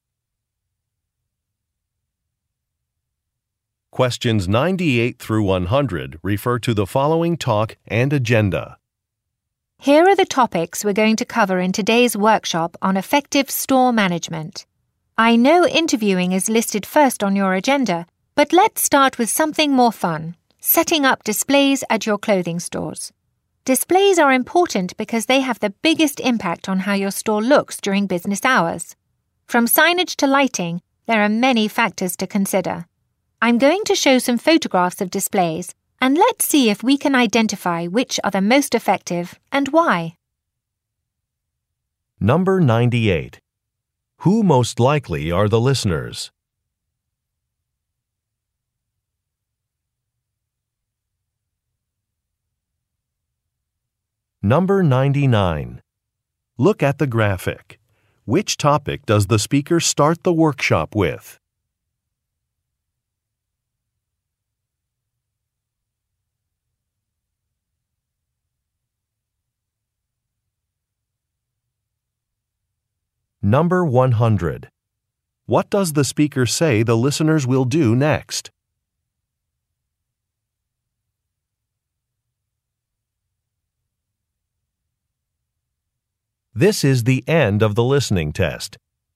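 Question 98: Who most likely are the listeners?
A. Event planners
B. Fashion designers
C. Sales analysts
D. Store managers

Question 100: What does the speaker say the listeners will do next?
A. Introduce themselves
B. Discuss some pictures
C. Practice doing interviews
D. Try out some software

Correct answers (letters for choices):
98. D
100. B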